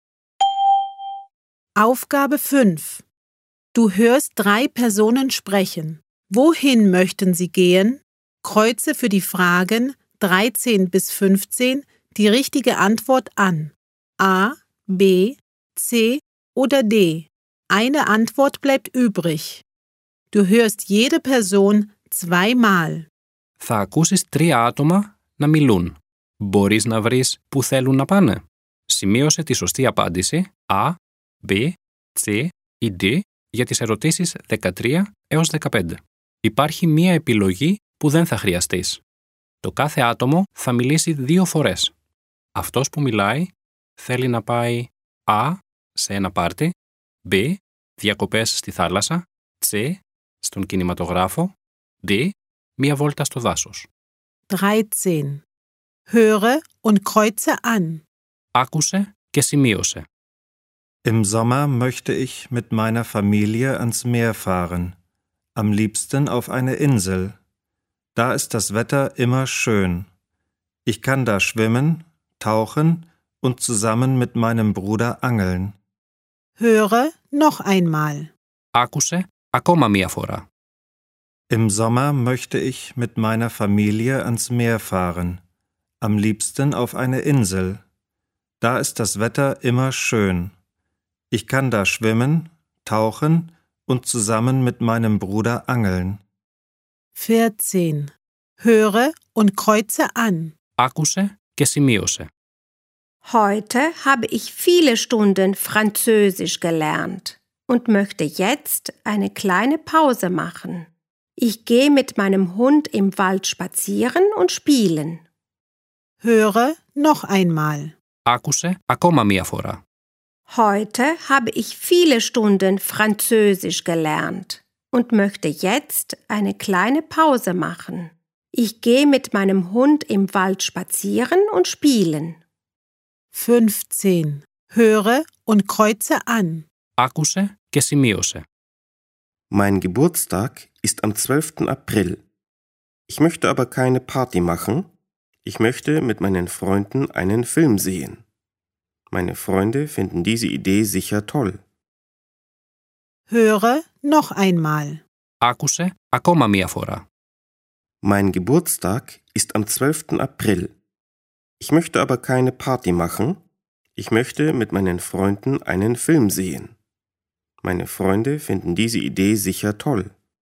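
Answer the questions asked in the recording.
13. B: Διακοπές στη θάλασσα
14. D: Μία βόλτα στο δάσος
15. C: Στον κινηματογράφο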